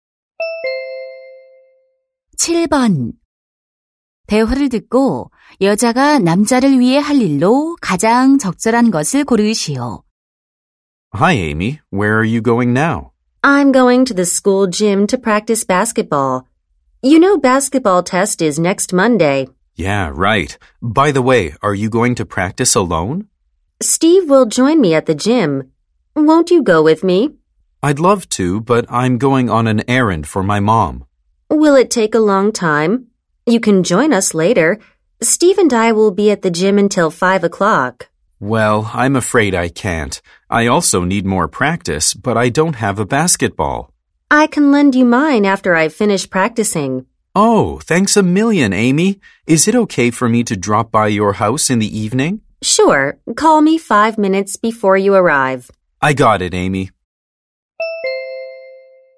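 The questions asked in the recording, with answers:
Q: 대화를 듣고 여자가 남자를 위해 할 일로 가장 적절한 것을 고르시오.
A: 농구공을 빌려주기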